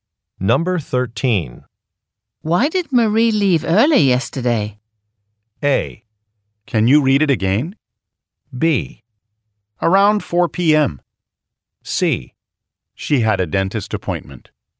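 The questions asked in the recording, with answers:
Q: Why did Marie leave early yesterday?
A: C: She had a dentist appointment.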